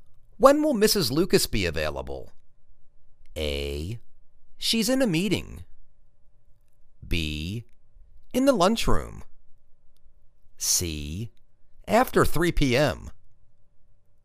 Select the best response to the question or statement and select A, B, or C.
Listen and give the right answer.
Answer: After 3 p.m.